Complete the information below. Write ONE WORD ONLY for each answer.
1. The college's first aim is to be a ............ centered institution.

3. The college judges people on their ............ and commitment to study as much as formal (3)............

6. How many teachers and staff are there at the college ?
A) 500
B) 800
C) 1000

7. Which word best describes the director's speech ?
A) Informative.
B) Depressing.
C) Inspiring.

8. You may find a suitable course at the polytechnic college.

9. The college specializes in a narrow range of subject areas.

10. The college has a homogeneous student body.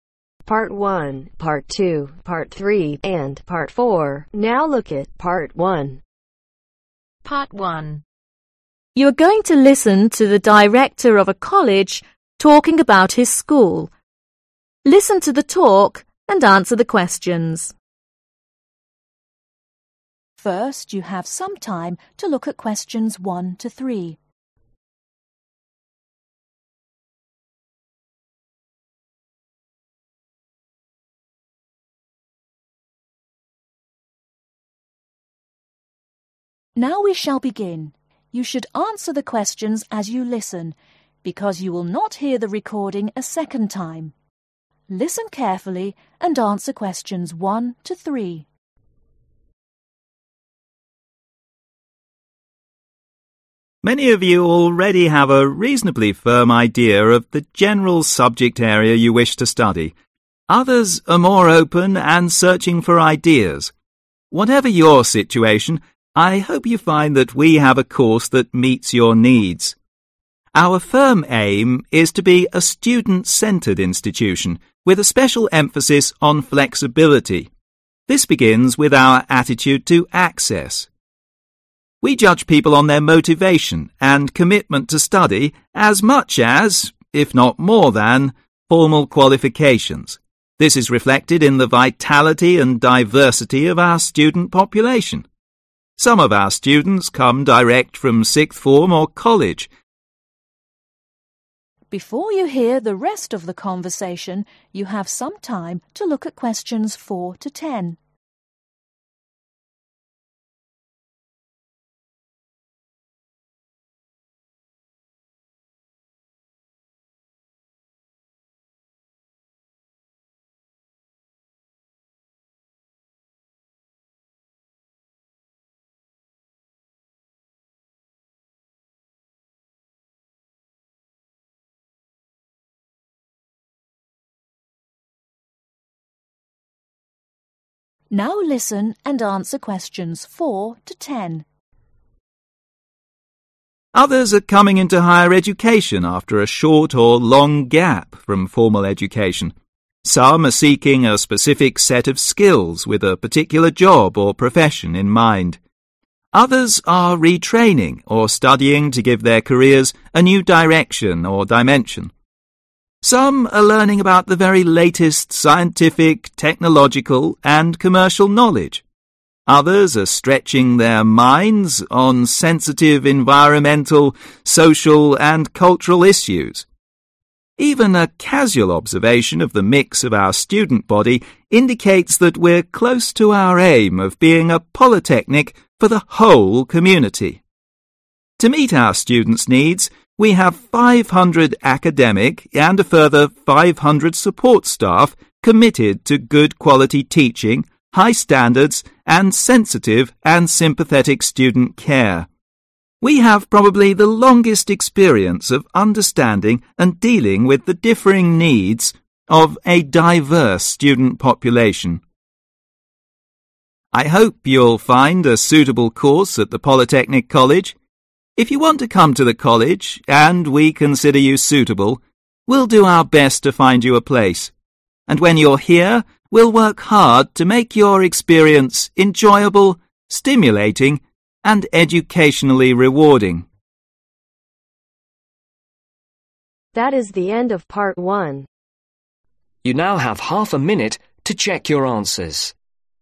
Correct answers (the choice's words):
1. Student
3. Qualifications
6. 1000
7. Informative.
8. accurate
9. not given
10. inaccurate